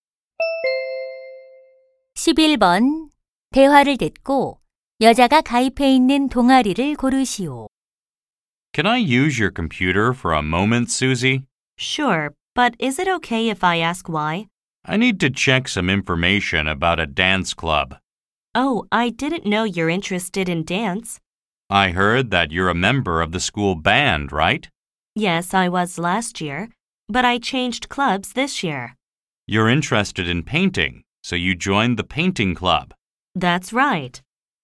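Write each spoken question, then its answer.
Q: 대화를 듣고 여자가 가입해 있는 동아리를 고르시오.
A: 미술(그림) 동아리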